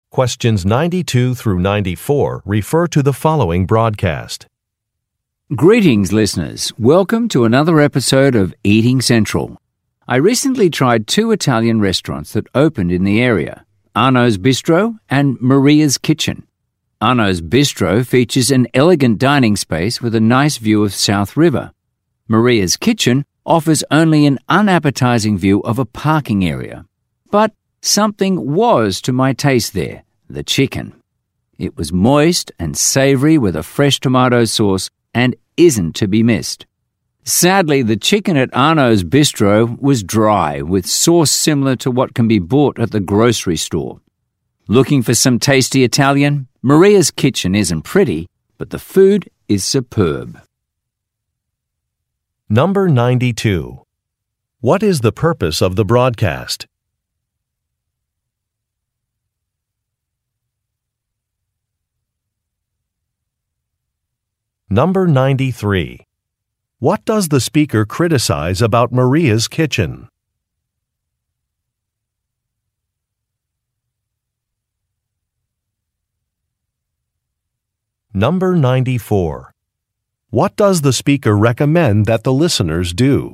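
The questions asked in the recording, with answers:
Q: What is the purpose of the broadcast?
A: To review two new Italian restaurants

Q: What does the speaker criticize about Maria's Kitchen?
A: Its unappetizing view of a parking area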